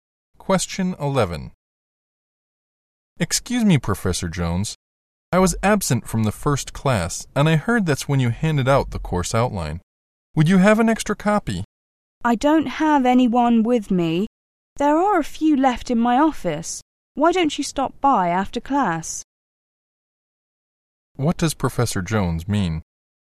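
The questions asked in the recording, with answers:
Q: What does Professor Jones mean?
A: The student can get a copy of the course outline from his office after class.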